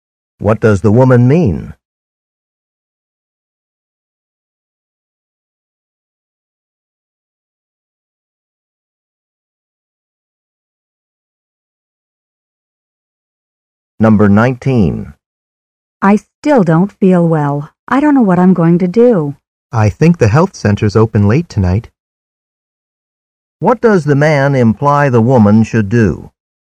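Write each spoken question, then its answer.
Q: What does the man imply the woman should do?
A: Go to the health center tonight.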